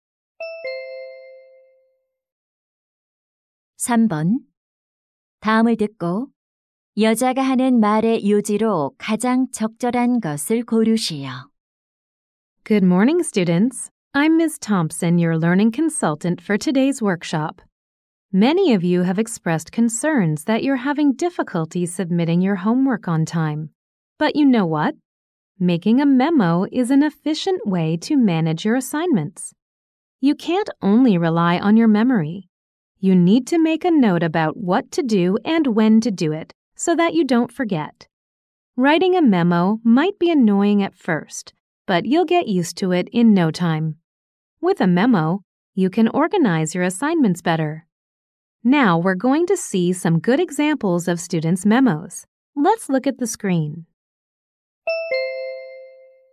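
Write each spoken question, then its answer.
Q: 다음을 듣고 여자가 하는 말의 요지로 가장 적절한 것을 고르시오.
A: 메모를 하면 과제를 효율적으로 관리할 수 있다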